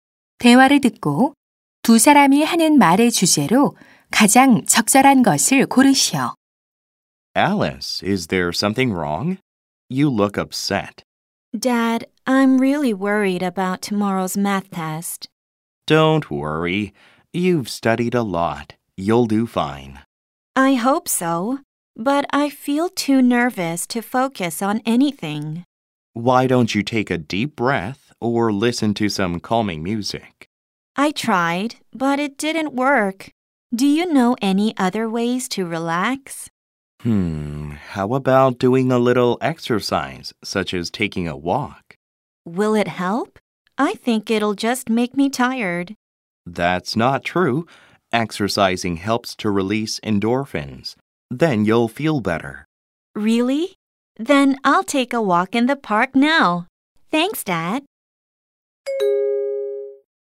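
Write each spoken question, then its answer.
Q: 대화를 듣고 두 사람이 하는 말의 주제로 가장 적절한 것을 고르시오.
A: 시험 불안을 줄이는 방법으로서의 운동(산책)의 효과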